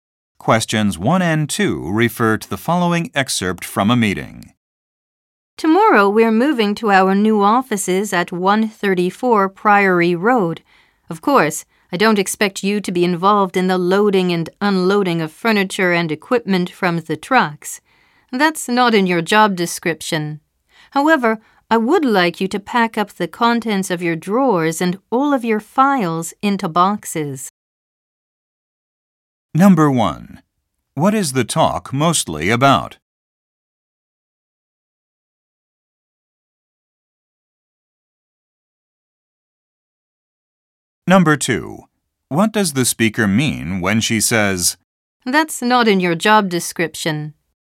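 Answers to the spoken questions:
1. Moving to new offices
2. The listeners do not have to load or unload the furniture and equipment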